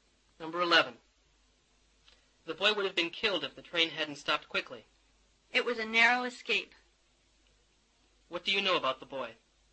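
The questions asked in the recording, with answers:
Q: What do you know about the boy?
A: He narrowly escaped being killed by a train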